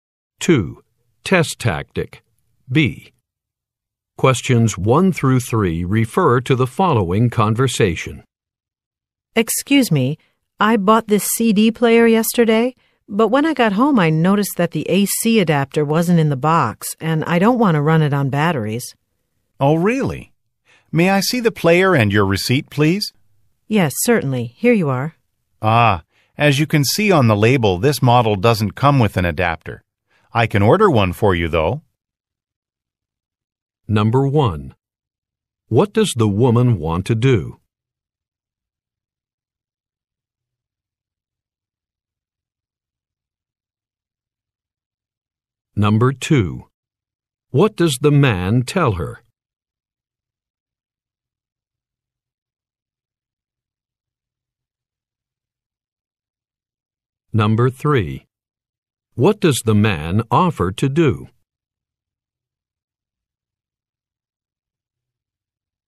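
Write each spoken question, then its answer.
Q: What does the woman want to do?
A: Get the AC adapter for the CD player she bought

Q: What does the man tell her?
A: That model doesn't come with an adapter

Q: What does the man offer to do?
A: Order an adapter for her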